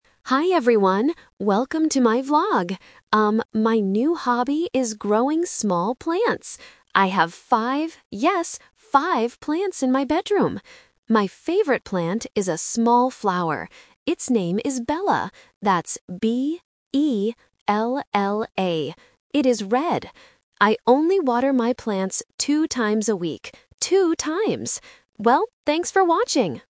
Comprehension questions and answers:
Listen to the vlog about a new hobby and choose the correct answer (A, B, or C) for each question.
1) How many plants does the vlogger have in her bedroom?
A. Two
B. Five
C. Four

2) What is the name of her favorite plant?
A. Balla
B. Bella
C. Stella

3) How often does she water her plants?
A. Two times a day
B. Two times a week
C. Five times a week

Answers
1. B. Five
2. B. Bella
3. B. Two times a week

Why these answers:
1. The speaker clearly says, "I have five... yes, five plants." Option (A) "Two" is a trap because it is the number of times she waters the plants. Option (C) "Four" is not mentioned at all.
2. The vlogger spells the name out loud: "B-E-L-L-A." Option (A) "Balla" is a distractor because it sounds very similar. Option (C) "Stella" is a plausible name but is never mentioned.
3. She states, "I only water my plants two times a week." Option (A) "Two times a day" is a trap that uses the correct number but the wrong time period. Option (C) "Five times a week" is a trap that reuses the number of plants she owns.

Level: A1

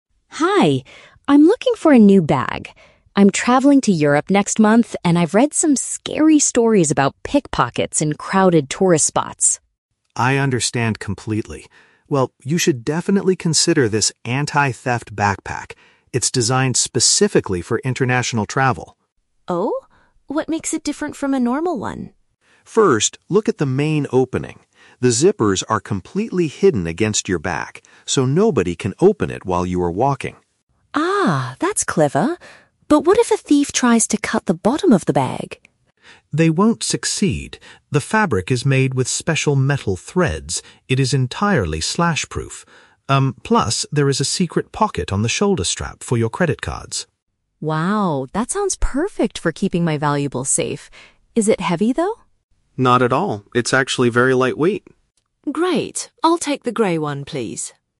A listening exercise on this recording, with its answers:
Listen to the conversation between a customer and a shop assistant. Choose the correct answer (A, B, or C) for each question.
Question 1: Why does the customer want to buy a new bag?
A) She had her old backpack stolen in Europe last month.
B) She is preparing for an overseas trip and fears thieves.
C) She needs a larger bag to carry her university books.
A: B) She is preparing for an overseas trip and fears thieves.

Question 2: How does the backpack protect against being cut?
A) It is constructed with strong metallic materials.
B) It comes with a thick, hard plastic cover.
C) The zippers are locked securely at the bottom.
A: A) It is constructed with strong metallic materials.

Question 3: Where is the best place to store bank cards, according to the assistant?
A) Inside the main opening of the backpack.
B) In a small wallet attached to the inside.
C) In a concealed section on the strap.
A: C) In a concealed section on the strap.

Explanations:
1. The Key: Emma says she is "traveling to Europe next month" (an overseas trip) and has read scary stories about "pickpockets" (thieves). The Trap (A): The audio mentions "Europe", but she is going there next month. She did not have her bag stolen there last month. Plausible but not mentioned (C): A backpack is often used for university books, but Emma does not mention going to school.

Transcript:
Emma: Hi, I'm looking for a new bag. I'm traveling to Europe next month, and I've read some scary stories about pickpockets in crowded tourist spots.
Liam: I understand completely. Well, you should definitely consider this anti-theft backpack. It's designed specifically for international travel.
Emma: Oh? What makes it different from a normal one?
Liam: First, look at the main opening. The zippers are completely hidden against your back, so nobody can open it while you are walking.
Emma: Ah, that's clever. But what if a thief tries to cut the bottom of the bag?
Liam: They won't succeed. The fabric is made with special metal threads. It is entirely slash-proof. Um, plus, there is a secret pocket on the shoulder strap for your credit cards.
Emma: Wow, that sounds perfect for keeping my valuables safe. Is it heavy, though?
Liam: Not at all. It's actually very lightweight.

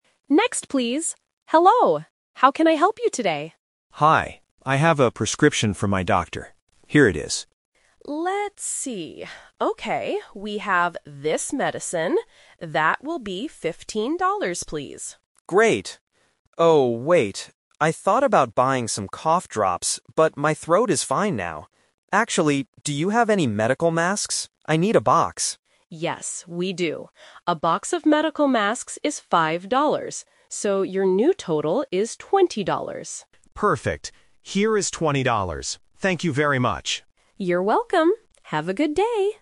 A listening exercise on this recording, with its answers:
Listen to the conversation between a customer and a pharmacist. Choose the correct answer (A, B, or C) for each question.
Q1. What did the customer give the pharmacist at the beginning?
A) A health insurance card.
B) A prescription.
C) A box of medical masks.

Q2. What extra item did the customer decide to buy?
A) Some cough drops.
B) A box of medical masks.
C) Some vitamins.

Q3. How much money did the customer pay in total?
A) 15 dollars.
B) 5 dollars.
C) 20 dollars.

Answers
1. B) A prescription.
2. B) A box of medical masks.
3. C) 20 dollars.

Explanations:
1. The customer clearly says, "I have a prescription from my doctor. Here it is." Trap A is wrong: A health insurance card is a plausible thing to show at a pharmacy, but it is never mentioned in the audio. Trap C is wrong: The customer buys the masks at the end of the conversation; he didn't give them to the pharmacist at the beginning.
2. The customer asks, "Actually, do you have any medical masks? I need a box." Trap A is wrong (The Twist): The customer says "I thought about buying some cough drops, but my throat is fine now." He thought about it, but rejected the idea. Trap C is wrong: Vitamins are not mentioned in the conversation.
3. The pharmacist says "your new total is 20 dollars," and the customer replies, "Here is 20 dollars." Trap A is wrong (Math Trap): 15 dollars is only the price of the medicine, not the total. Trap B is wrong (Math Trap): 5 dollars is only the price of the medical masks.

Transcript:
Pharmacist: Next, please! Hello, how can I help you today?
Customer: Hi. I have a prescription from my doctor. Here it is.
Pharmacist: Let's see... Okay, we have this medicine. That will be 15 dollars, please.
Customer: Great. Oh, wait. I thought about buying some cough drops, but my throat is fine now. Actually, do you have any medical masks? I need a box.
Pharmacist: Yes, we do. A box of medical masks is 5 dollars. So, your new total is 20 dollars.
Customer: Perfect. Here is 20 dollars. Thank you very much.

